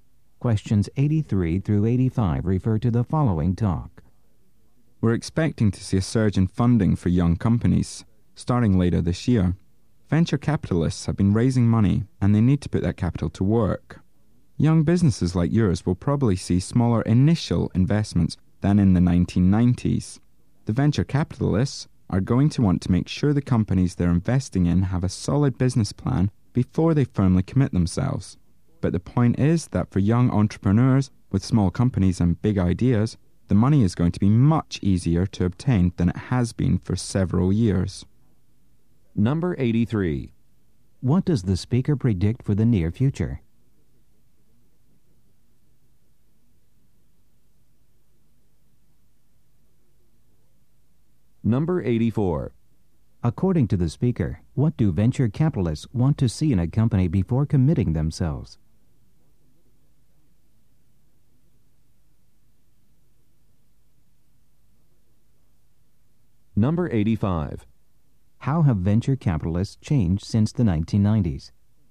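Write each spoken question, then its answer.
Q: What does the speaker predict for the near future?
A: A surge in funding for young companies

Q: According to the speaker, what do venture capitalists want to see in a company before committing themselves?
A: A solid business plan

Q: How have venture capitalists changed since the 1990s?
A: They make smaller initial investments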